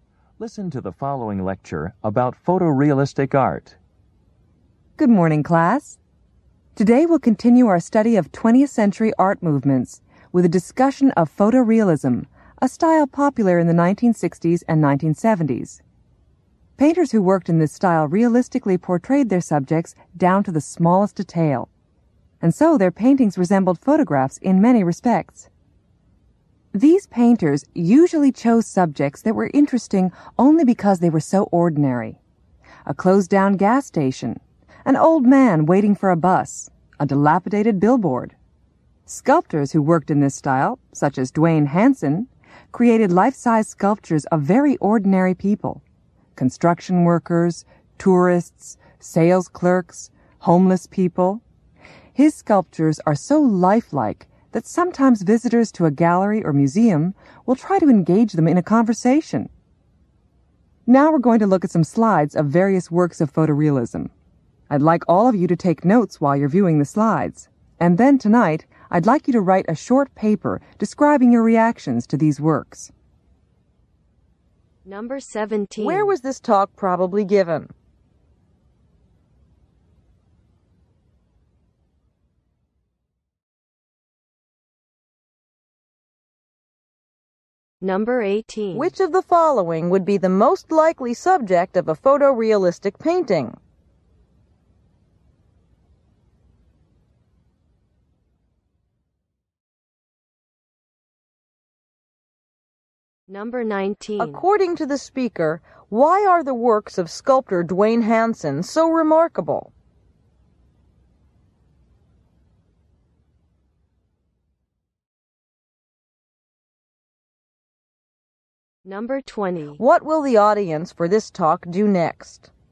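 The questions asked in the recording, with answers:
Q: Where was this talk probably given?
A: In an art class

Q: According to the speaker, why are the works of sculptor Dwayne Hansen so remarkable?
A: They are so lifelike

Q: What will the audience for this talk do next?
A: Look at slides and take notes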